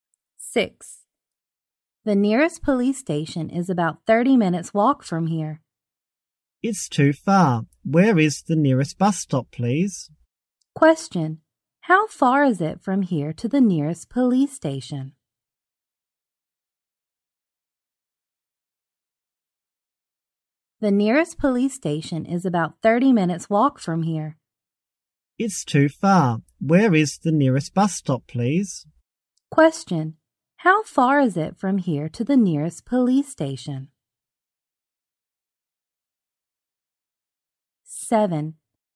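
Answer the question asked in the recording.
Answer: About 30 minutes' walk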